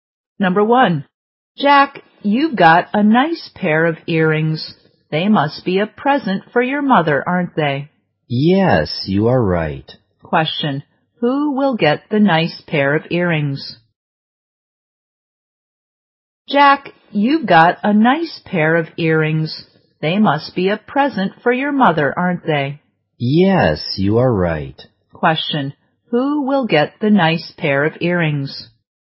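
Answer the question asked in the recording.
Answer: Jack's mother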